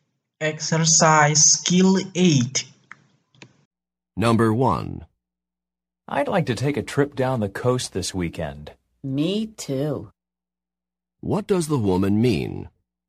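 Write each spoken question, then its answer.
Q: What does the woman mean?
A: She would also like to take a trip down the coast this weekend.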